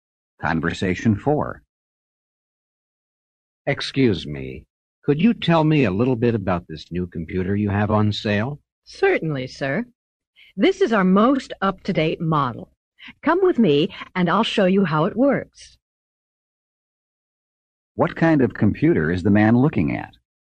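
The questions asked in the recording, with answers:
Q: What kind of computer is the man looking at?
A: A new, up-to-date model on sale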